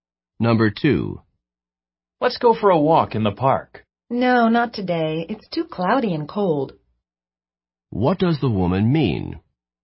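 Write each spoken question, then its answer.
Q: What does the woman mean?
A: She doesn't want to walk in the park today because it's too cloudy and cold.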